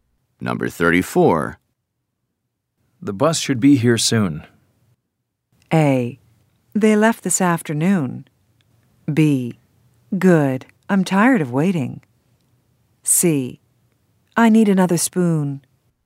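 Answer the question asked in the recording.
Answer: B: Good. I'm tired of waiting.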